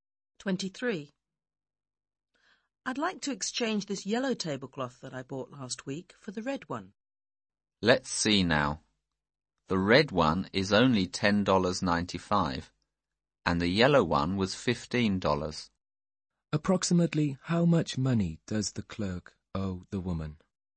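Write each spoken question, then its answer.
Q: Approximately how much money does the clerk owe the woman?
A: About $4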